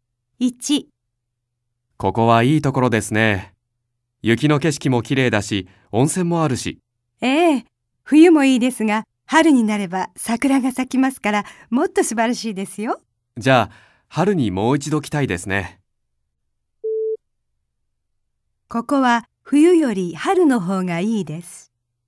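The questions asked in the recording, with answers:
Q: ここは冬より春の方がいいです。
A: ○(正しい)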